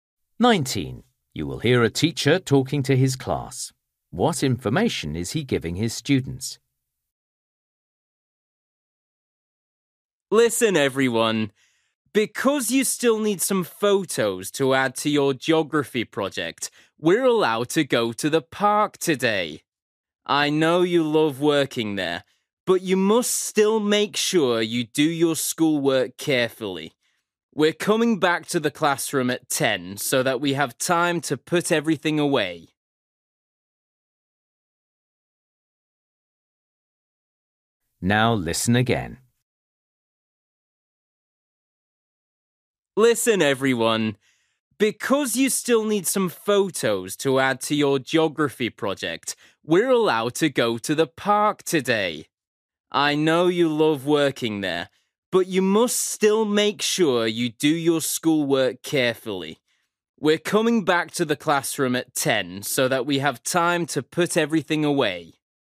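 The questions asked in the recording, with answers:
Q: What information is he giving his students?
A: they are going to the park today to take photos for their geography project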